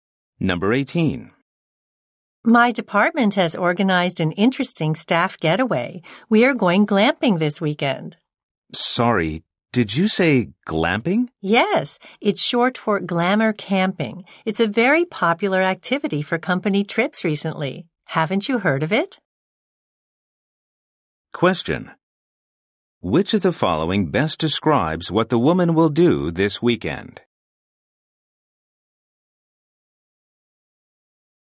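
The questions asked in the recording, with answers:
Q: Which of the following best describes what the woman will do this weekend?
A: Go glamping (glamour camping) on a company trip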